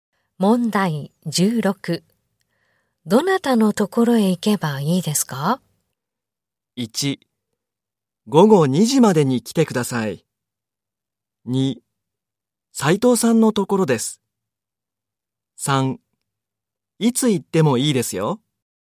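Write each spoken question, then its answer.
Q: どなたのところへ行けばいいですか?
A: 2: 斉藤さんのところです。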